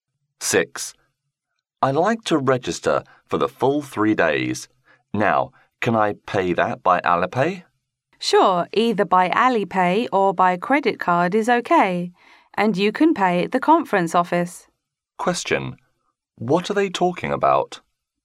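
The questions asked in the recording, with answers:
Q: What are they talking about?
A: Registering and paying for a conference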